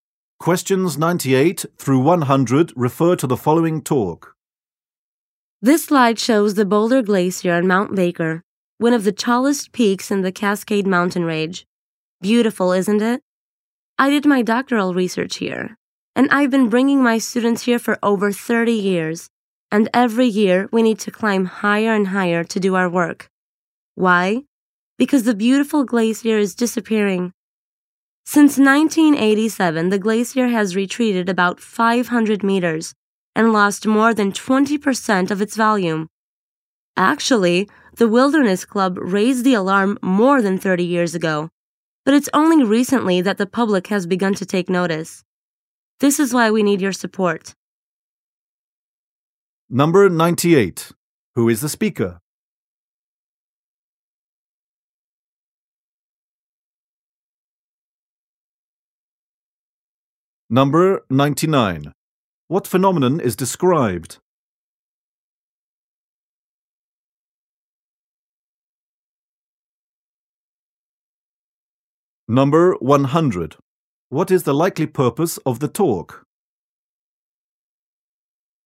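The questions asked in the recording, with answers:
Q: Who is the speaker?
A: A professor

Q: What phenomenon is described?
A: A glacier disappearing

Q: What is the likely purpose of the talk?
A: To ask for support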